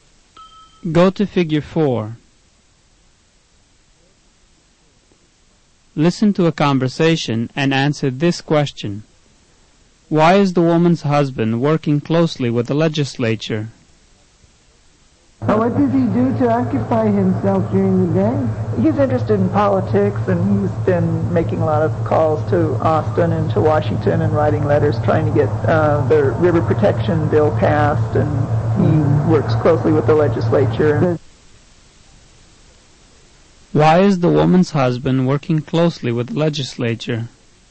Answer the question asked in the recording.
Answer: The correct answer is C. He's trying to get the river protection bill passed.